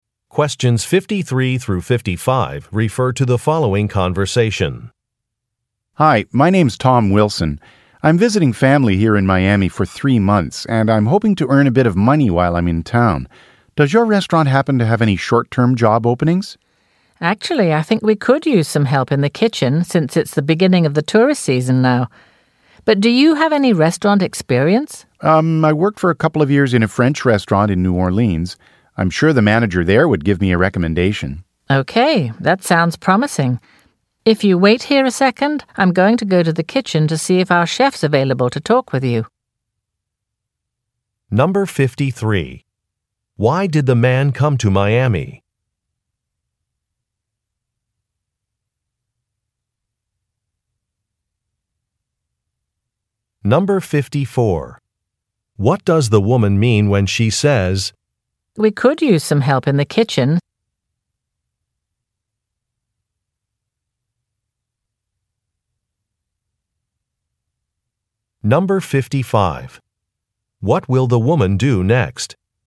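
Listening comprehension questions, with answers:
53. Why did the man come to Miami?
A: To see some relatives

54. What does the woman mean when she says, "we could use some help in the kitchen"?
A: She may have work to offer the man.

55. What will the woman do next?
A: Look for an employee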